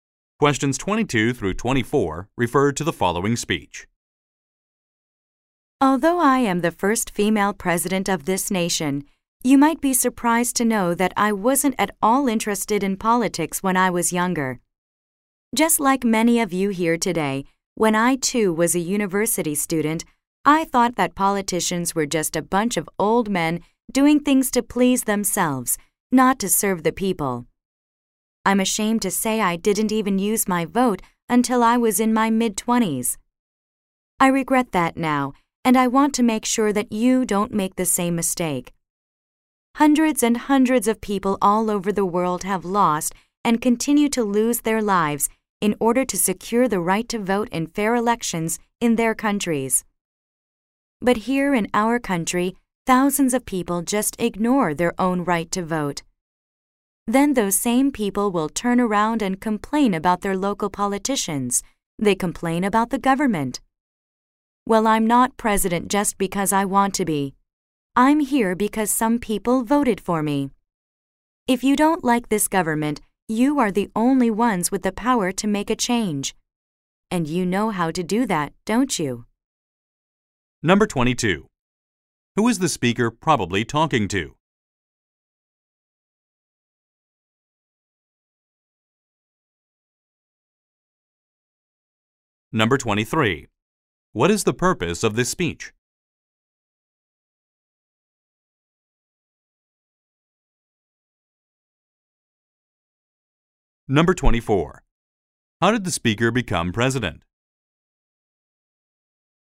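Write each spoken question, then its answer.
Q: Who is the speaker probably talking to?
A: University students.

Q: What is the purpose of this speech?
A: To encourage people to vote.

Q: How did the speaker become president?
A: People voted for her.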